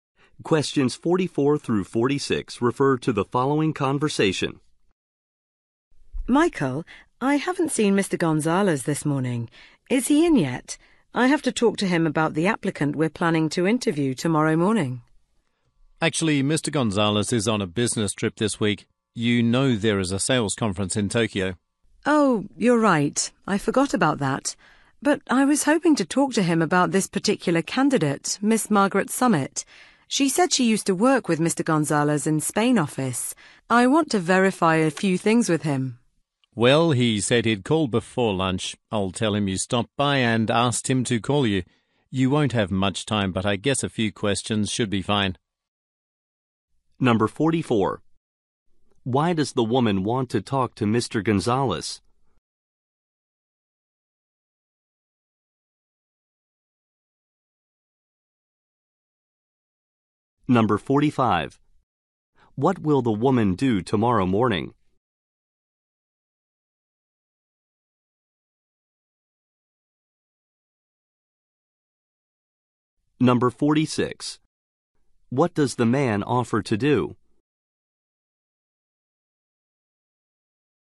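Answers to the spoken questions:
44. To verify things about a candidate who worked with him
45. Interview a job applicant
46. Ask Mr. Gonzalez to call her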